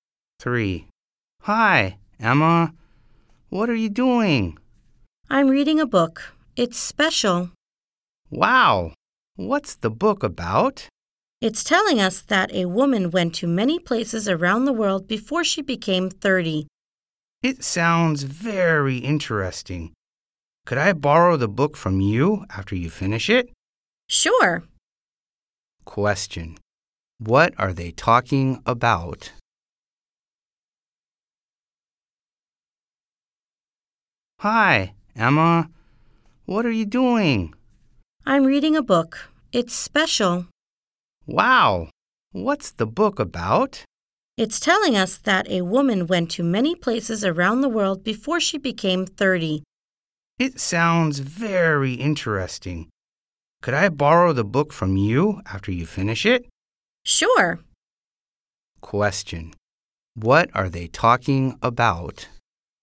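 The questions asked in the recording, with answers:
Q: What are they talking about?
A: A book Emma is reading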